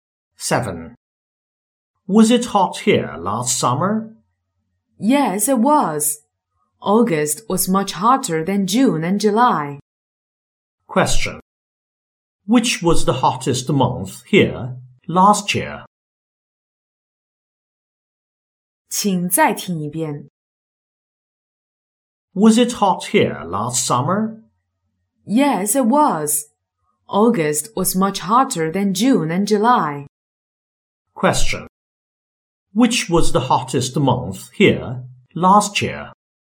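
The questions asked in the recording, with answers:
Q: Which was the hottest month here last year?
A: August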